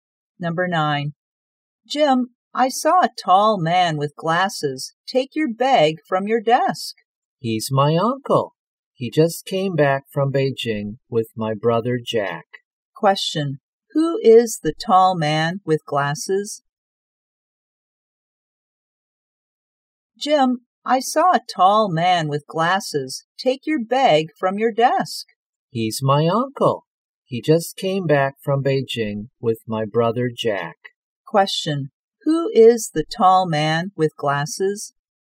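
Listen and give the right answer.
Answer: Jim's uncle.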